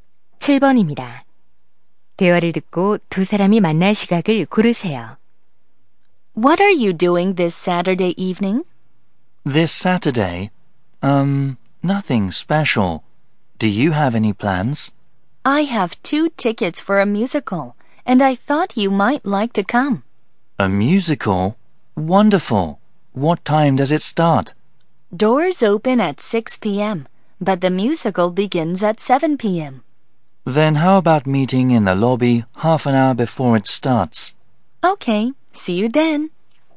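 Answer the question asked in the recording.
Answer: 오후 6시 30분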